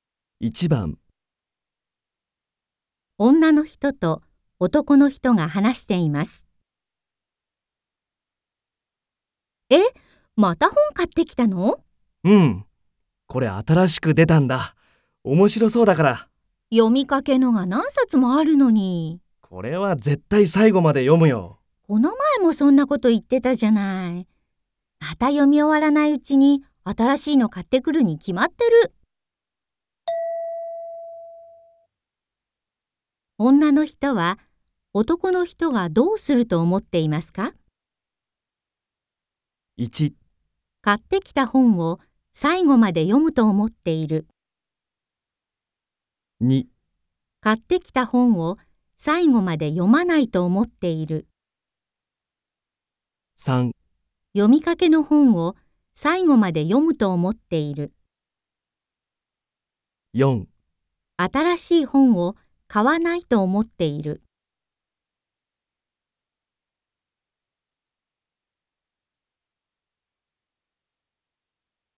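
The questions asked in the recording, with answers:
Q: 女の人は男の人がどうすると思っていますか?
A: 2: 買ってきた本を最後まで読まないと思っている。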